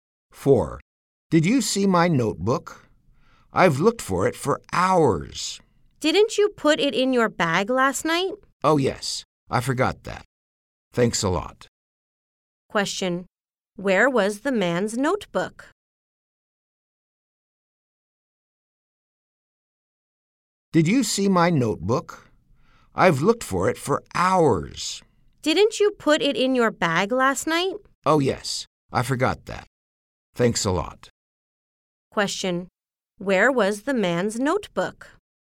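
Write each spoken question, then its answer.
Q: Where was the man's notebook?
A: In his bag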